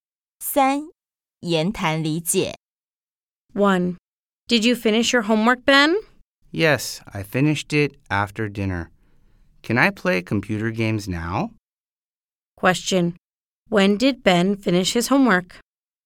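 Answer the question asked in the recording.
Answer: After dinner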